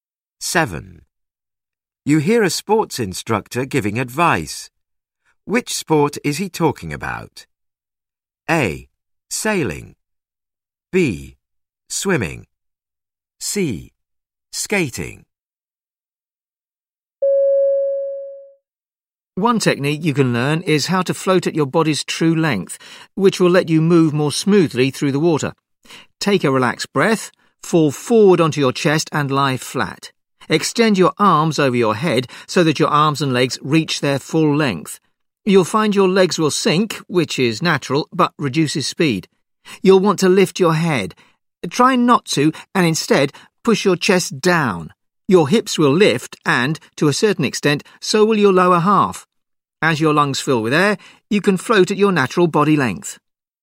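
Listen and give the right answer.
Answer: B: Swimming.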